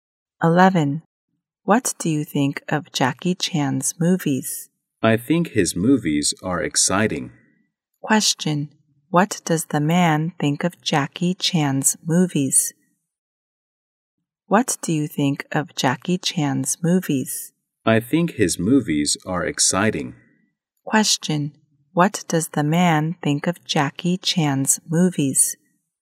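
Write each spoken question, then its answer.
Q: What does the man think of Jackie Chan's movies?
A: Exciting.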